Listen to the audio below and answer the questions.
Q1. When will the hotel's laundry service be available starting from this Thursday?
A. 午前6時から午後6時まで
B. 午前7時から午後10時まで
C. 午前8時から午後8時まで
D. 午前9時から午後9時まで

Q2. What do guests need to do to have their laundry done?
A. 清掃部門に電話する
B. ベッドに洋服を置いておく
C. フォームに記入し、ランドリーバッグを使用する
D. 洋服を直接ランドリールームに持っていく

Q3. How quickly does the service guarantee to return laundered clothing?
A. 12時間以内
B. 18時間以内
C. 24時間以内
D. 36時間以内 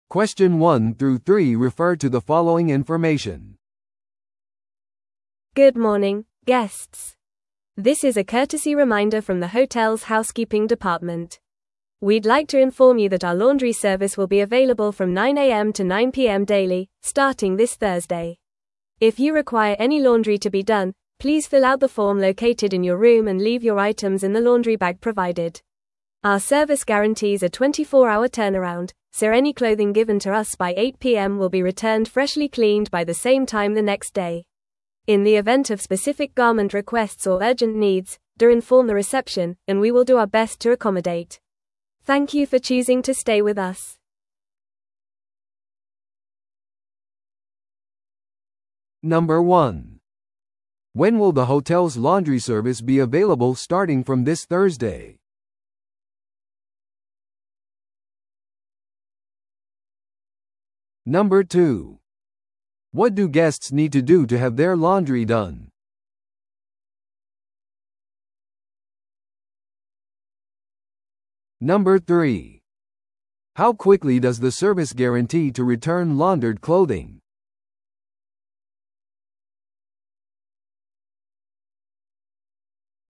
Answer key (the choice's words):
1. 午前9時から午後9時まで
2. フォームに記入し、ランドリーバッグを使用する
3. 24時間以内

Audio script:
Good morning, guests! This is a courtesy reminder from the hotel's housekeeping department. We'd like to inform you that our laundry service will be available from 9am to 9pm daily, starting this Thursday. If you require any laundry to be done, please fill out the form located in your room and leave your items in the laundry bag provided. Our service guarantees a 24-hour turnaround, so any clothing given to us by 8pm will be returned freshly cleaned by the same time the next day. In the event of specific garment requests or urgent needs, do inform the reception, and we will do our best to accommodate. Thank you for choosing to stay with us!